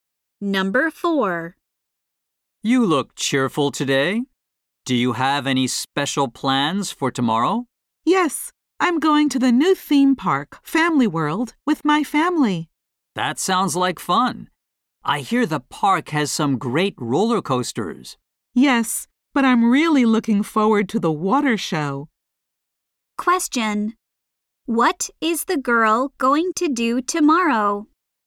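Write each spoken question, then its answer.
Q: What is the girl going to do tomorrow?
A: Go to the theme park Family World with her family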